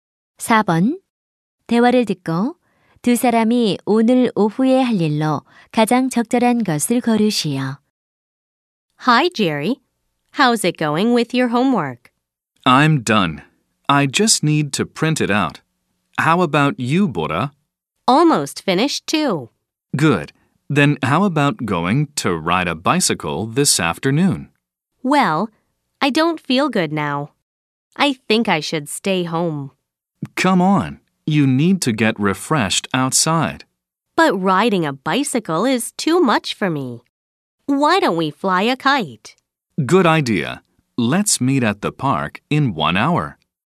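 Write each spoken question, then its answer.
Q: 대화를 듣고 두 사람이 오늘 오후에 할 일로 가장 적절한 것을 고르시오.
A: 연날리기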